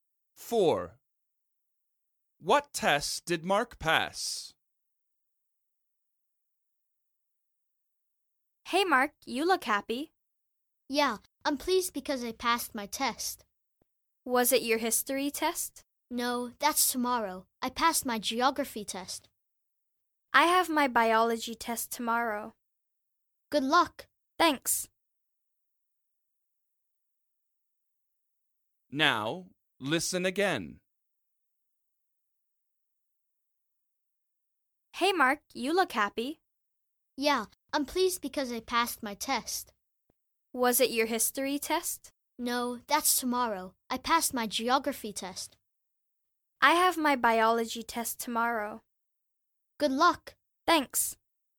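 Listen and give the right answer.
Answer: His geography test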